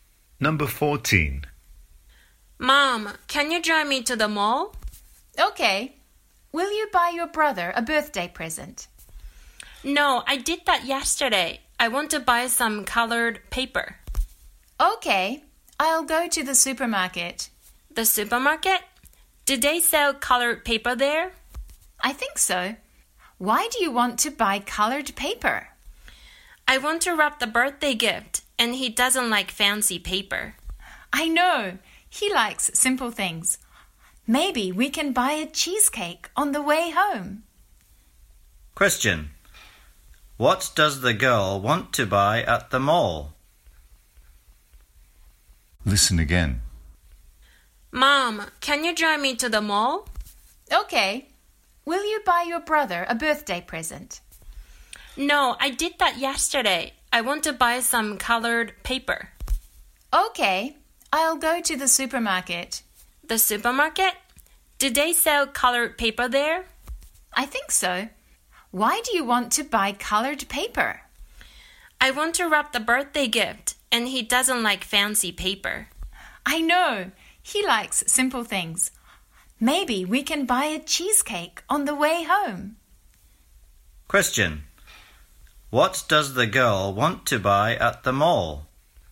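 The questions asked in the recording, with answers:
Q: What does the girl want to buy at the mall?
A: Colored paper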